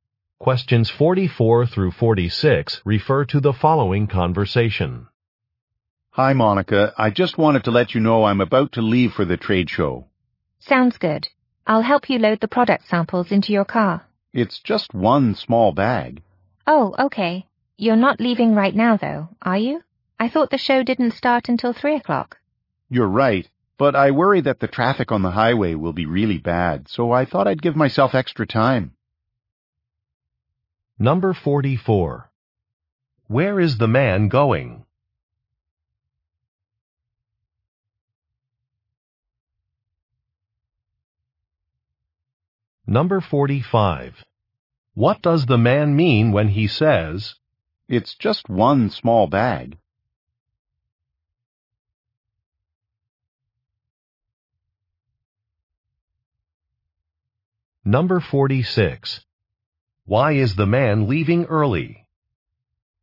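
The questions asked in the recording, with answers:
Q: Where is the man going?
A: To a trade show

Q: Why is the man leaving early?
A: He worries the highway traffic will be bad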